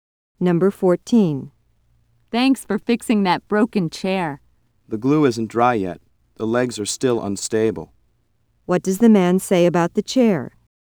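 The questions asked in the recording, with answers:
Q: What does the man say about the chair?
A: It shouldn't be used yet because the glue isn't dry.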